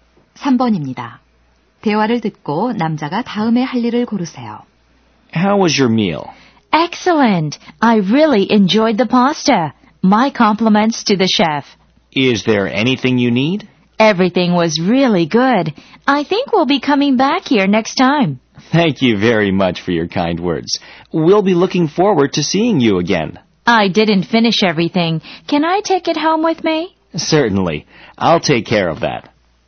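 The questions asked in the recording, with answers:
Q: 대화를 듣고 남자가 다음에 할 일을 고르세요.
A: 남은 음식을 포장해 가져간다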